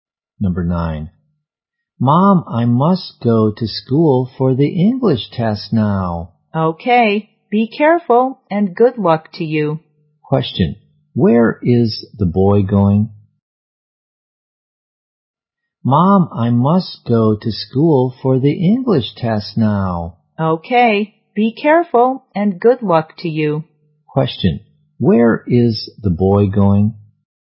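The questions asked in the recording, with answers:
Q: where is the boy going?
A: To school (for the English test)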